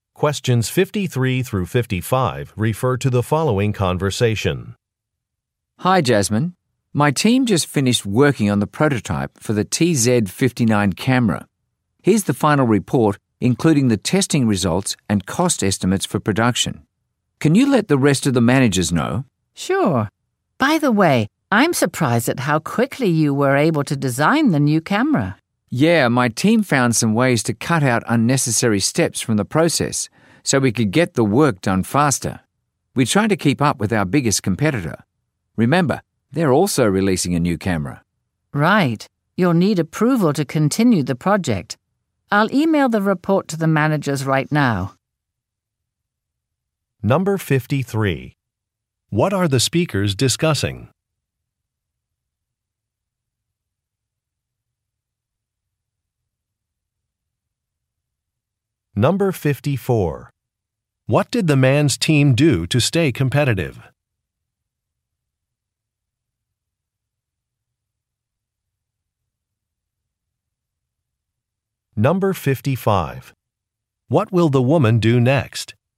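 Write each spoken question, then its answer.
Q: What are the speakers discussing?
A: A new camera prototype

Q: What did the man's team do to stay competitive?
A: They cut out unnecessary steps to work faster

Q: What will the woman do next?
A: Email the report to the managers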